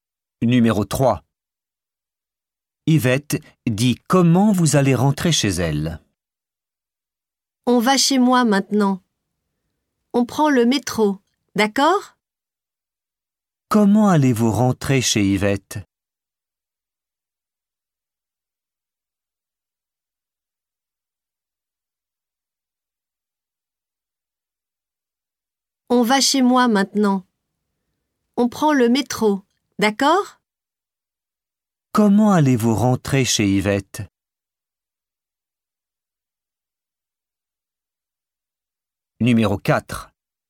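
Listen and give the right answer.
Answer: En métro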